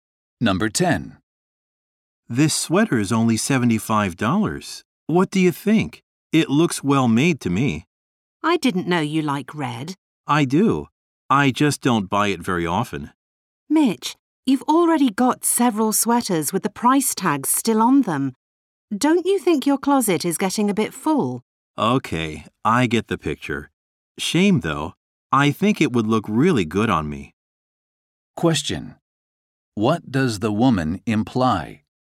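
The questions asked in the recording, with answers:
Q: What does the woman imply?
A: Mitch already has too many sweaters and shouldn't buy another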